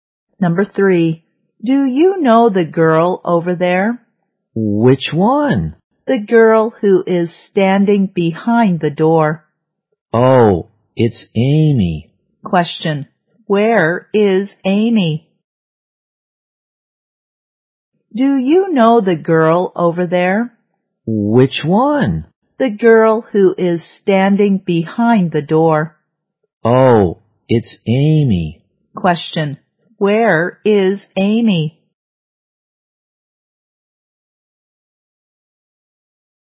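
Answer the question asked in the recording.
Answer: Behind the door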